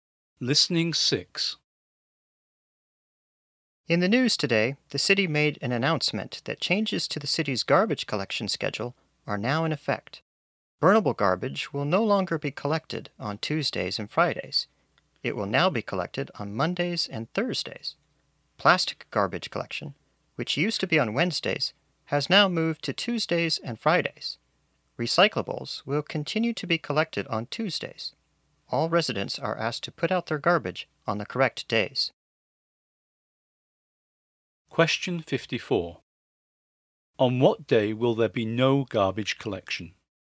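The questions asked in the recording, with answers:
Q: On what day will there be no garbage collection?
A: Wednesday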